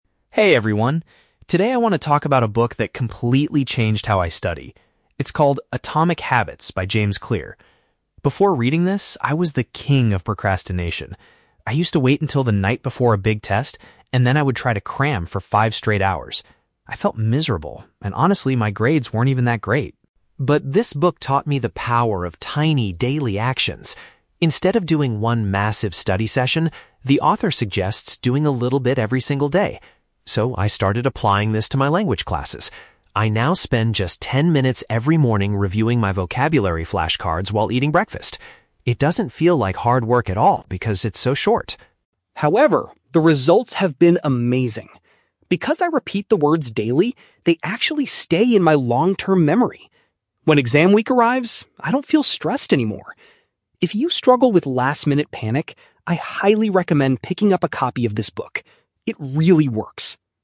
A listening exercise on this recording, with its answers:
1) What was Ben's primary study habit before he read the book?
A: He delayed his work and studied for many hours right before an exam.

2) How does Ben currently practice his vocabulary?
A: He looks at his flashcards briefly during his morning meal.

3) What is the main benefit Ben has experienced from his new routine?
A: He retains information much longer and experiences less pre-test anxiety.

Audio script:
Ben: Hey everyone. Today I want to talk about a book that completely changed how I study. It's called 'Atomic Habits' by James Clear. Before reading this, I was the king of procrastination. I used to wait until the night before a big test, and then I would try to cram for five straight hours. I felt miserable, and honestly, my grades weren't even that great.
But this book taught me the power of tiny, daily actions. Instead of doing one massive study session, the author suggests doing a little bit every single day. So, I started applying this to my language classes. I now spend just ten minutes every morning reviewing my vocabulary flashcards while eating breakfast. It doesn't feel like hard work at all because it's so short.
However, the results have been amazing. Because I repeat the words daily, they actually stay in my long-term memory. When exam week arrives, I don't feel stressed anymore. If you struggle with last-minute panic, I highly recommend picking up a copy of this book. It really works!